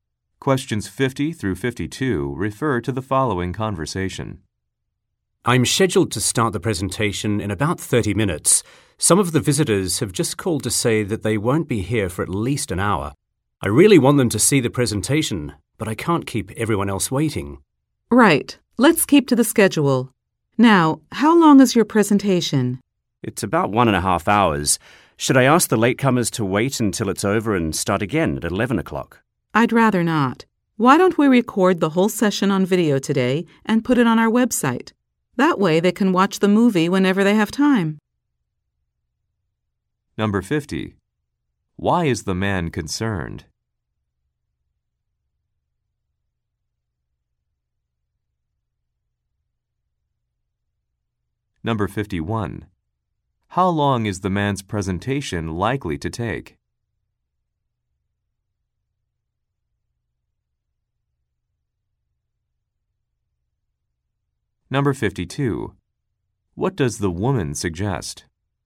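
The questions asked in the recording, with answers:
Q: Why is the man concerned?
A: Some visitors will arrive late for his presentation

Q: How long is the man's presentation likely to take?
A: About 1.5 hours

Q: What does the woman suggest?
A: Recording the session on video and putting it on the website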